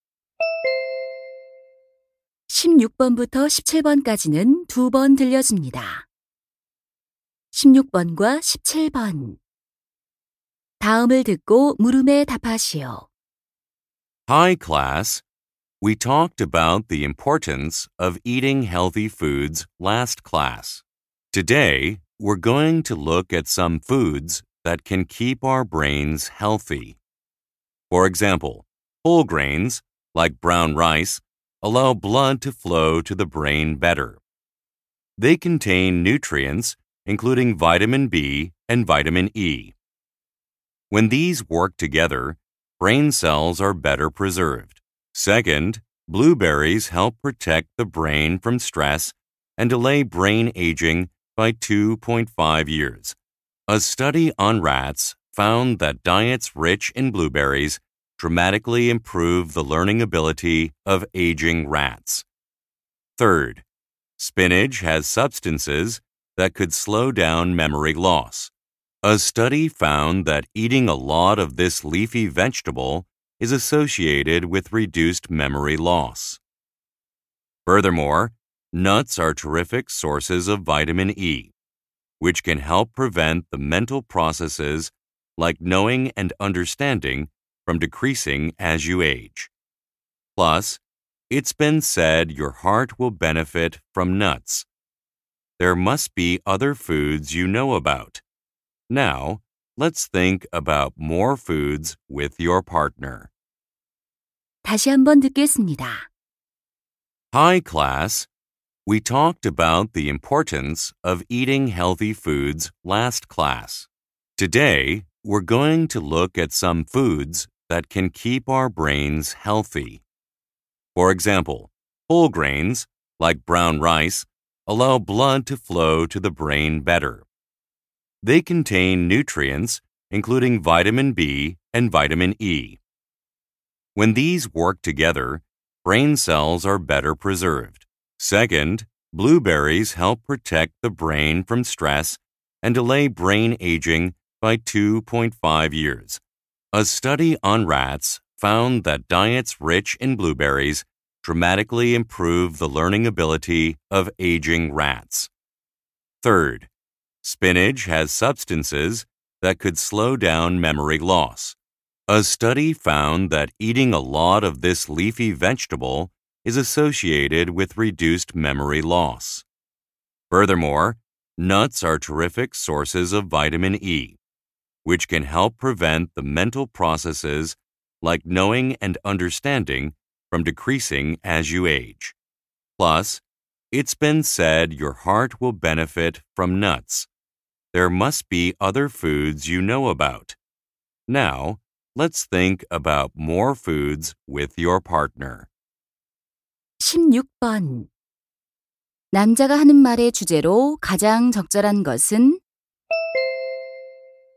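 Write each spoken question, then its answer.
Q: 남자가 하는 말의 주제로 가장 적절한 것은?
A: 뇌 건강에 좋은 음식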